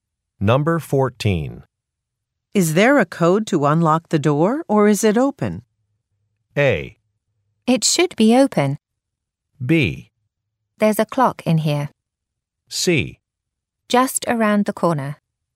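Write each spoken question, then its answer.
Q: Is there a code to unlock the door, or is it open?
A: A: It should be open.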